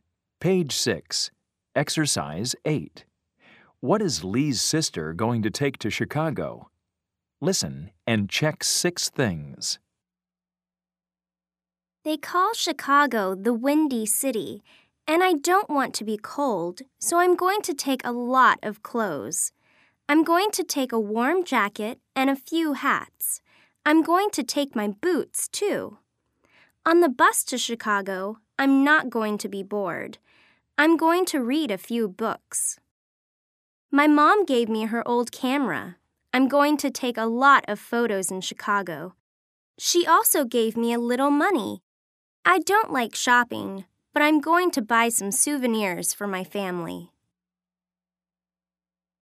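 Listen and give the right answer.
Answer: a warm jacket, a few hats, boots, a few books, a camera, and a little money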